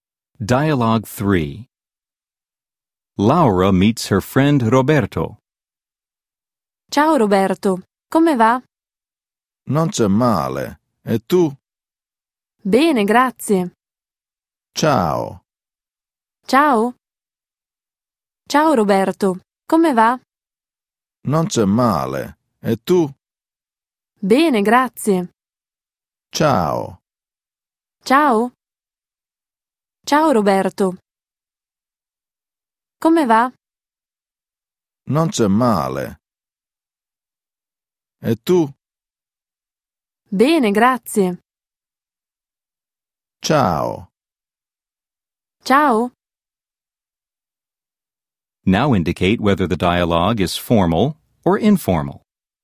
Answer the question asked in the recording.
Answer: 3. Informale.